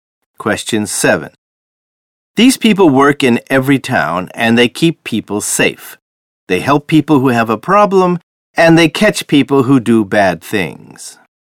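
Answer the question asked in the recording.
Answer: Police officers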